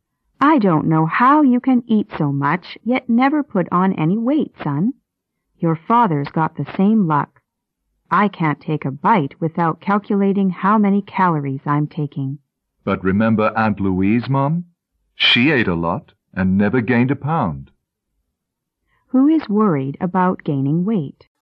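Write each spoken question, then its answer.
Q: Who is worried about gaining weight?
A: The mother.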